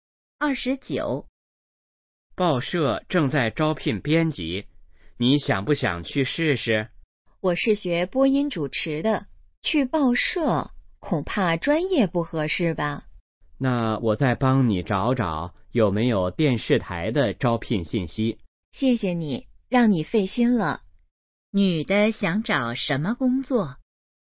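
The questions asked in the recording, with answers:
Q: 女的想找什么工作?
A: 电视台的工作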